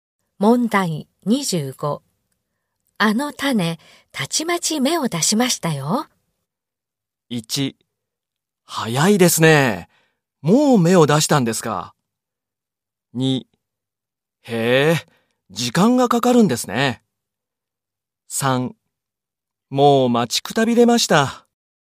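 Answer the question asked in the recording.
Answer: 1: 早いですね。もう芽を出したんですか。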